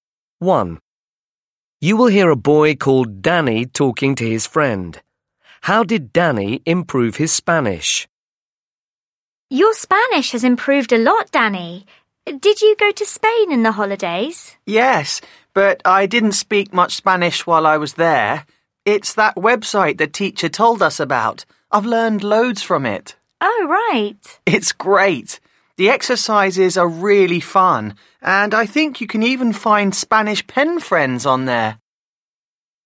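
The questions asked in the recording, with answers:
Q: How did Danny improve his Spanish?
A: By using a website the teacher told them about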